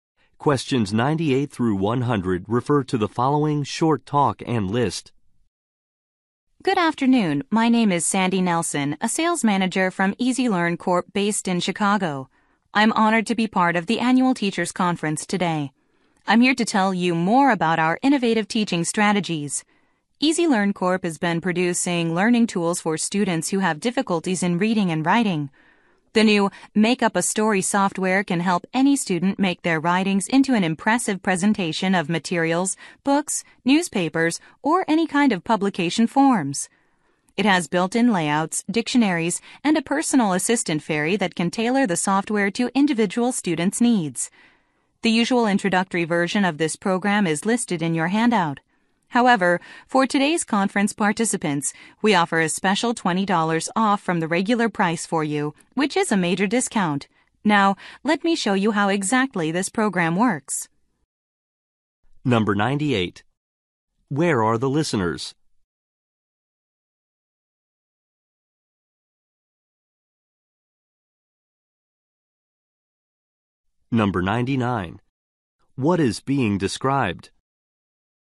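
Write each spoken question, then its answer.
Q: Where are the listeners?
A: At the annual teachers conference

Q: What is being described?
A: The Make Up a Story learning software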